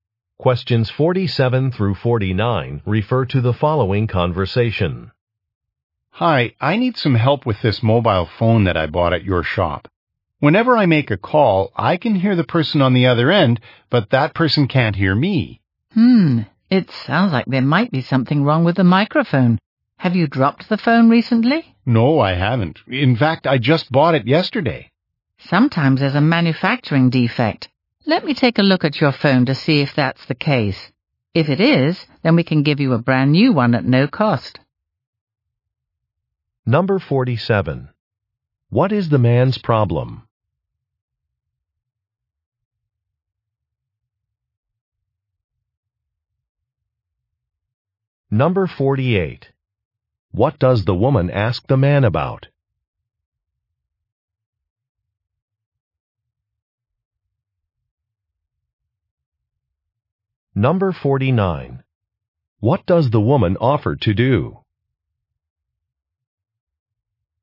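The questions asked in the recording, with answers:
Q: What is the man's problem?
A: People can't hear him on his phone

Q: What does the woman ask the man about?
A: Whether he dropped the phone

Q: What does the woman offer to do?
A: Replace the phone for free if defective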